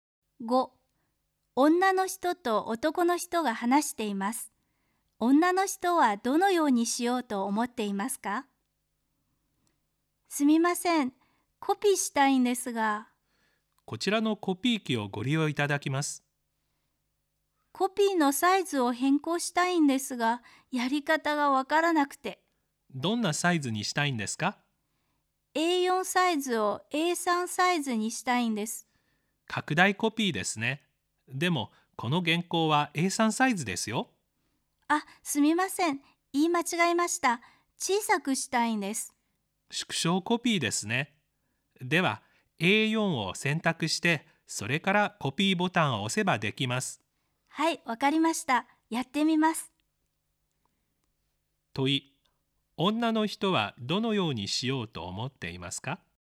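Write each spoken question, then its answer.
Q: 問い、女の人はどのようにしようと思っていますか?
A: A3の原稿をA4に縮小コピーする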